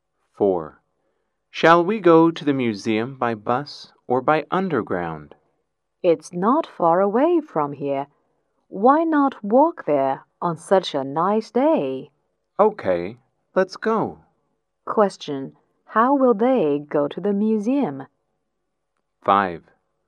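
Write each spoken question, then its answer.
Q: How will they go to the museum?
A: On foot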